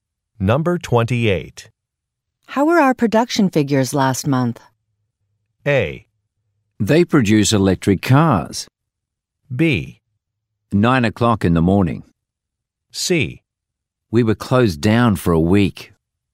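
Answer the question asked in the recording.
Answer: C: We were closed down for a week.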